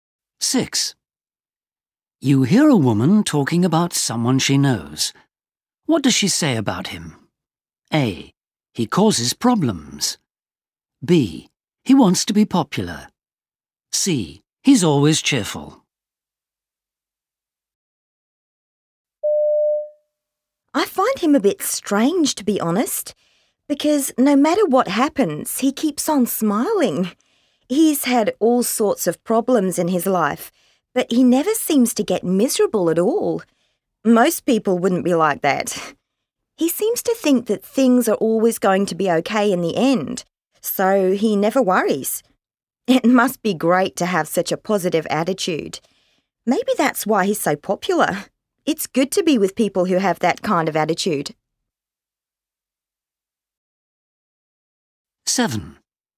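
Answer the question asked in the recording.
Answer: C: He's always cheerful.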